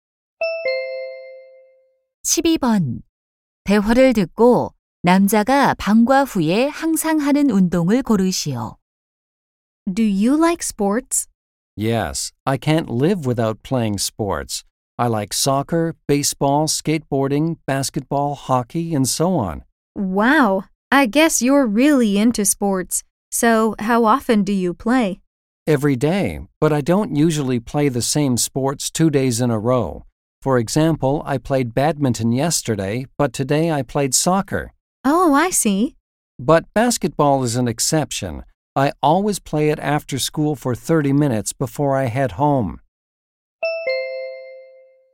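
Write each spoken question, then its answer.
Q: 대화를 듣고 남자가 방과 후에 항상 하는 운동을 고르시오.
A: 농구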